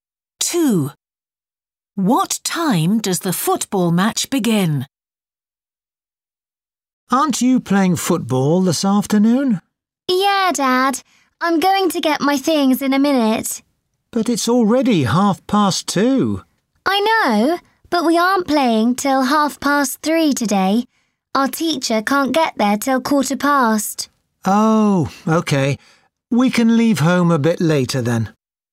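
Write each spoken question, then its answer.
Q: What time does the football match begin?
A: 3:30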